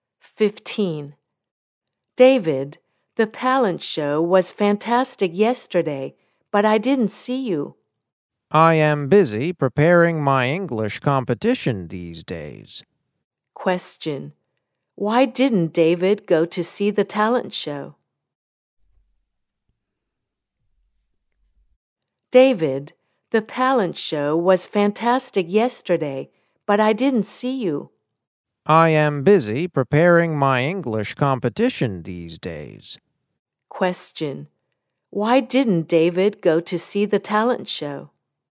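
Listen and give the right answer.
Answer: He was busy preparing for his English competition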